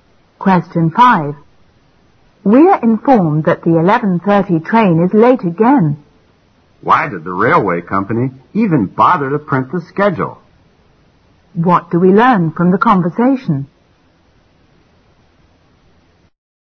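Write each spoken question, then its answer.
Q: What do we learn from the conversation?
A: The train is often late, so the schedule is unreliable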